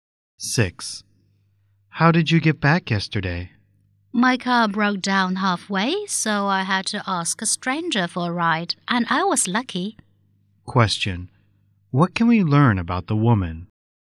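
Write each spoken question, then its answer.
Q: What can we learn about the woman?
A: Her car broke down and a stranger gave her a ride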